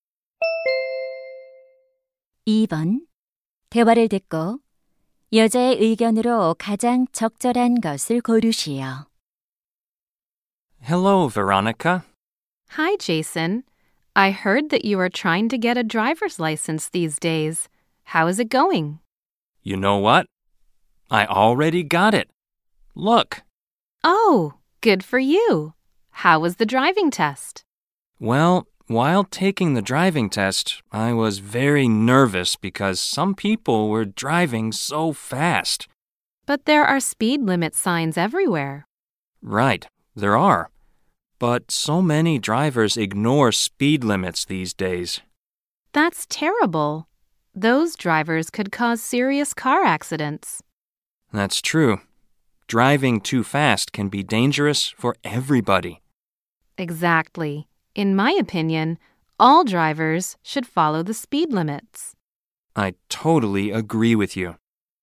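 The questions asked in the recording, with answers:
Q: 대화를 듣고 여자의 의견으로 가장 적절한 것을 고르시오.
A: 모든 운전자는 제한 속도를 지켜야 한다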